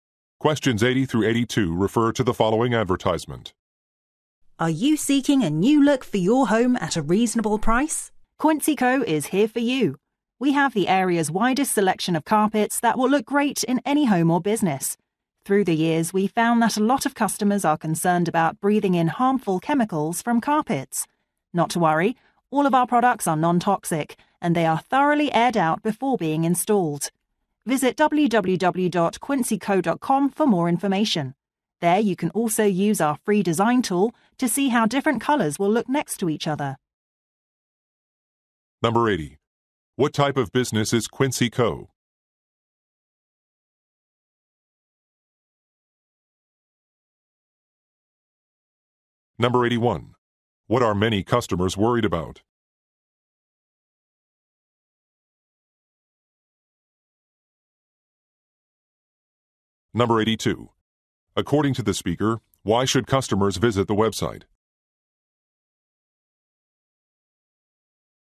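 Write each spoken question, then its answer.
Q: What type of business is Quincy Co.?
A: A carpet store

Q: What are many customers worried about?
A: Breathing in harmful chemicals from carpets

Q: According to the speaker, why should customers visit the website?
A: To use a free design tool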